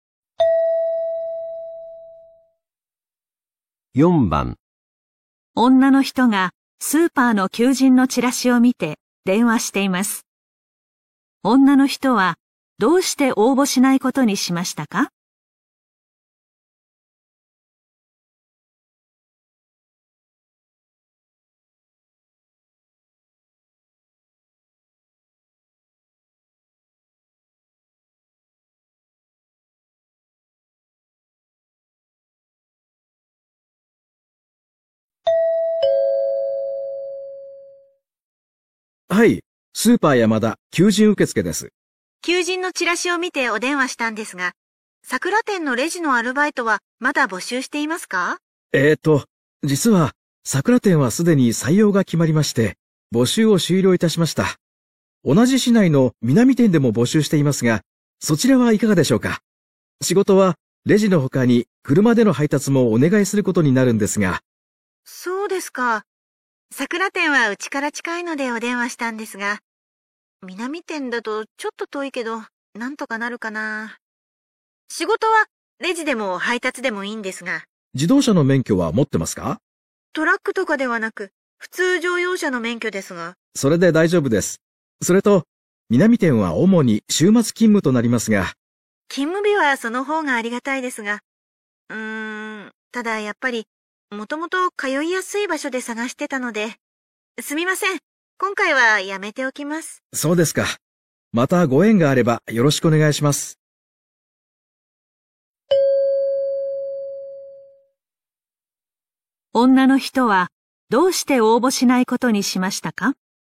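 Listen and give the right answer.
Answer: 南店は家から遠く通いにくいから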